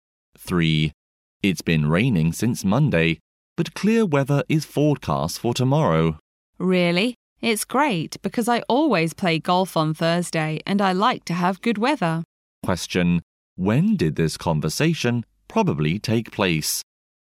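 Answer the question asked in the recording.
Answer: On Wednesday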